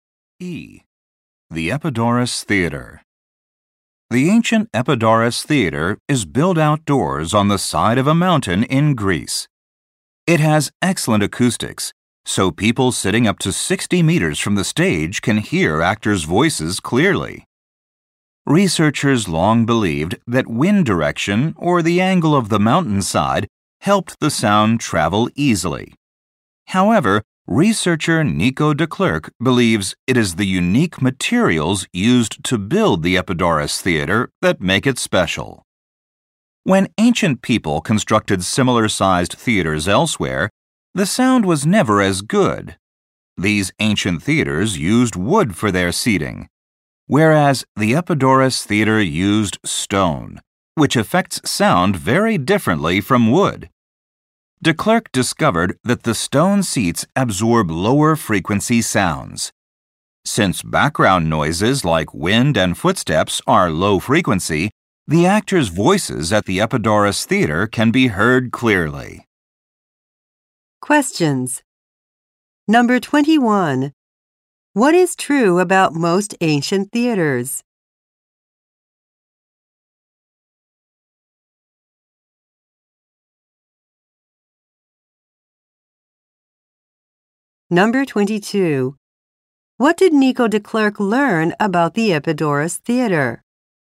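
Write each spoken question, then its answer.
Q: What is true about most ancient theaters?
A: They used wood for their seating.

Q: What did Nico de Klerk learn about the Epidaurus Theater?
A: Its stone seats absorb low-frequency background noise.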